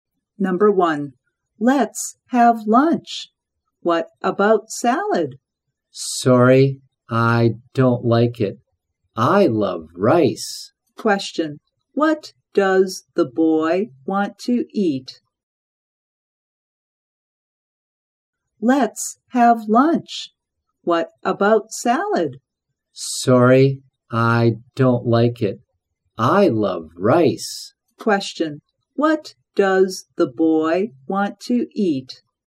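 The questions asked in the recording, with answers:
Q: what does the boy want to eat?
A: rice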